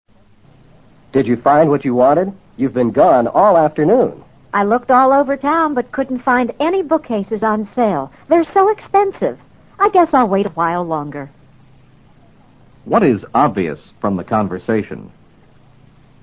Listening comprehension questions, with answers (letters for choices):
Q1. What is obvious from the conversation?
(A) The man and woman shopped all over town.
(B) The woman went to many different stores.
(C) The woman bought some bookcases on sale.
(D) The man sold the woman some expensive bookcases.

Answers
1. B

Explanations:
答案是依据you've been gone all afternoon和 I looked all over town 提供的信息做出的判断。be gone = be away 是系表结构。on sale: 折价销售。